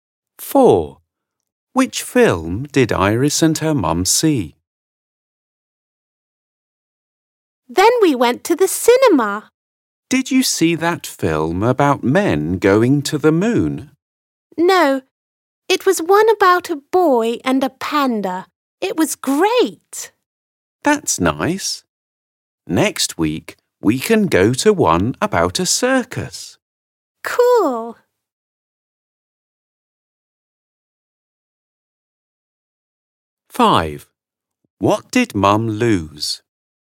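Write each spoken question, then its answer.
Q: Which film did Iris and her mum see?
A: a film about a boy and a panda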